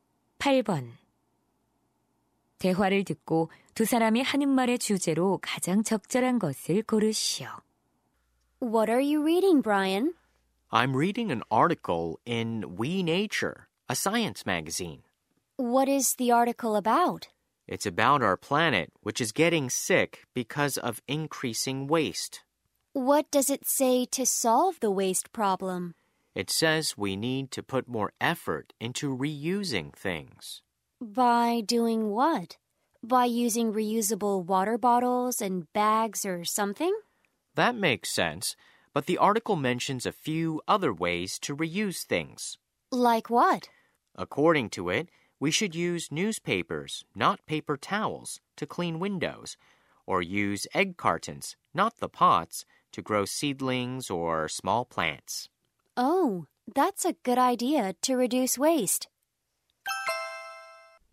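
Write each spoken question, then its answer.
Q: 대화를 듣고 두 사람이 하는 말의 주제로 가장 적절한 것을 고르시오.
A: 쓰레기를 줄이기 위한 물건 재사용 방법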